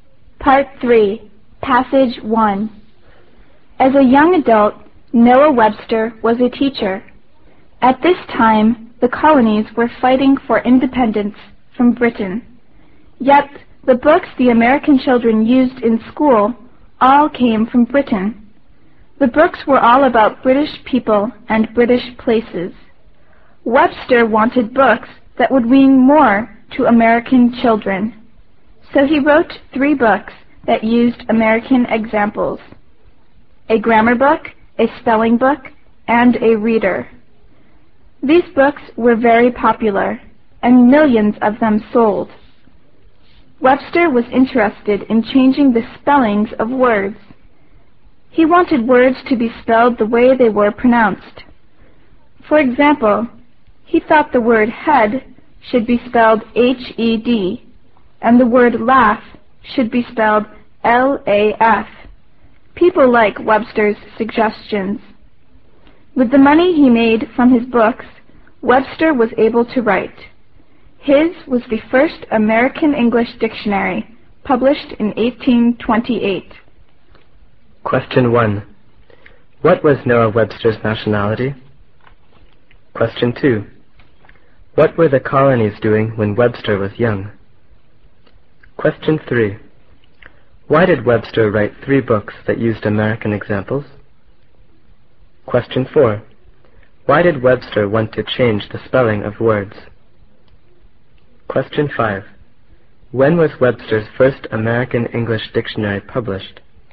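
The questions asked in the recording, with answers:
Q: What were the colonies doing when Webster was young?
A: Fighting for independence from Britain

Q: Why did Webster write 3 books that used American examples?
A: He wanted books that would mean more to American children

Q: Why did Webster want to change the spelling of words?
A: He wanted words spelled the way they were pronounced

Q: When was Webster's first American English dictionary published?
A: In 1828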